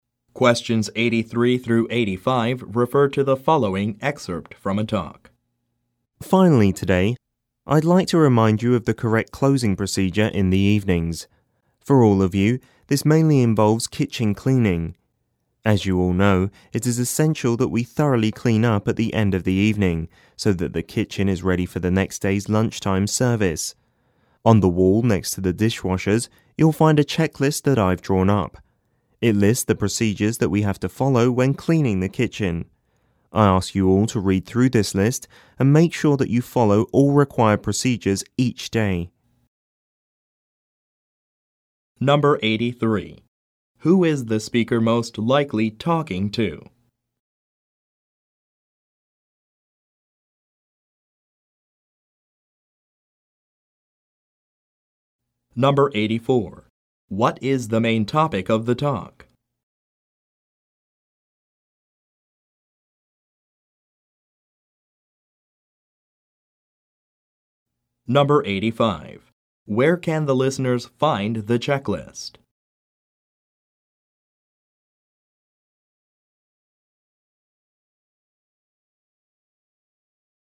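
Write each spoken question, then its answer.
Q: Who is the speaker most likely talking to?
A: Kitchen staff

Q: What is the main topic of the talk?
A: The evening closing (kitchen cleaning) procedure

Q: Where can the listeners find the checklist?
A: On the wall next to the dishwashers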